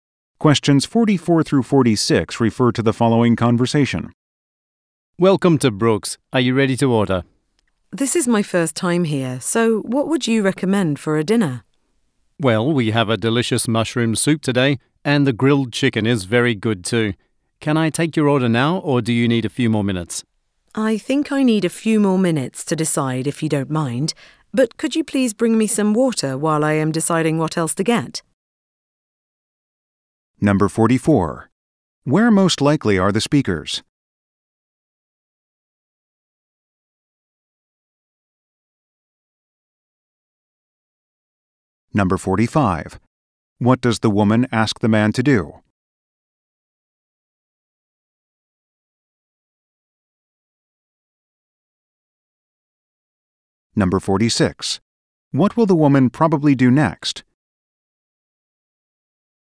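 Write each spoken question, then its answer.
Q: Where most likely are the speakers?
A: In a restaurant

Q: What does the woman ask the man to do?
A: Bring her some water

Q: What will the woman probably do next?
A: Decide what to order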